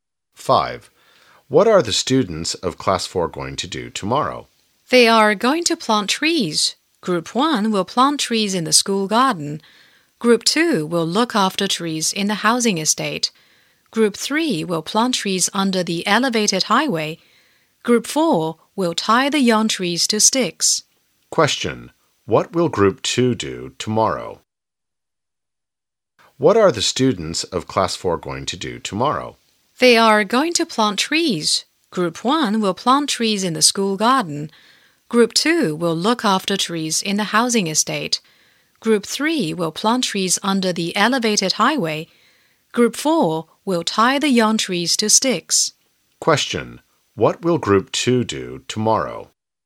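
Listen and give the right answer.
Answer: Look after trees in the housing estate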